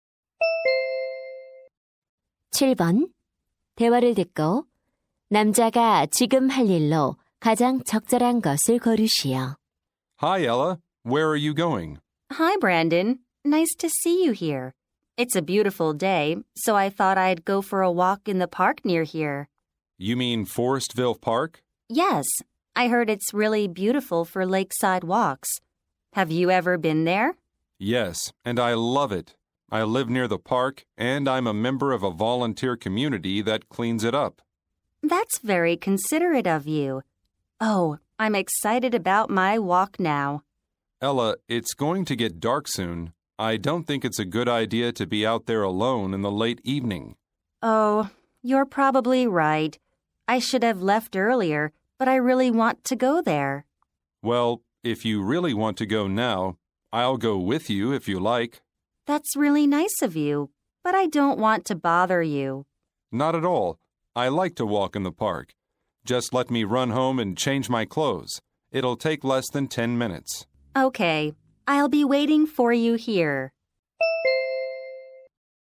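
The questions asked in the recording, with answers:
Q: 대화를 듣고 남자가 지금 할 일로 가장 적절한 것을 고르시오.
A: 집에 가서 옷 갈아입기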